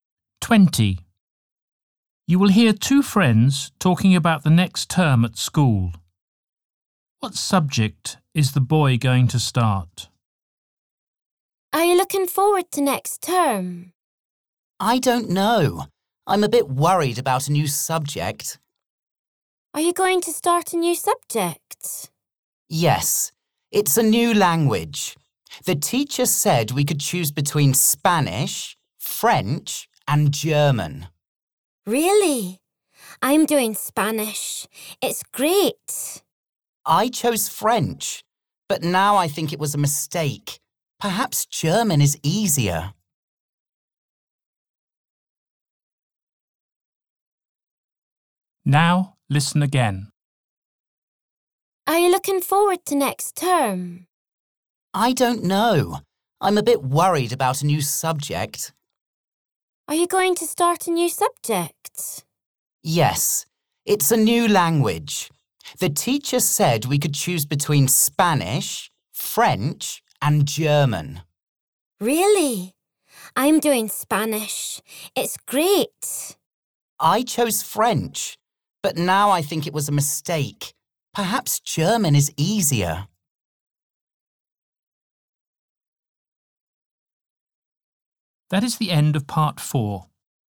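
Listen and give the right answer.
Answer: French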